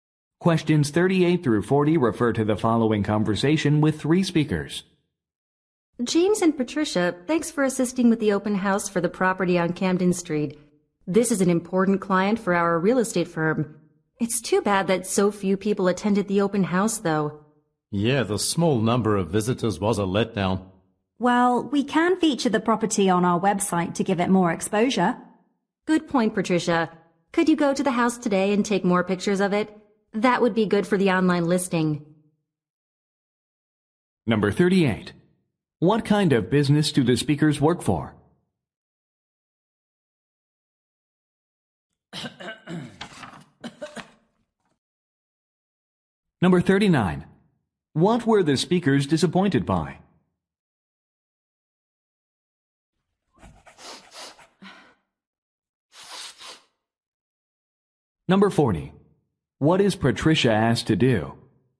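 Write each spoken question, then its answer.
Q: What kind of business do the speakers work for?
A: A real estate firm

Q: What were the speakers disappointed by?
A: Few people attended the open house

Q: What is Patricia asked to do?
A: Go to the house and take more pictures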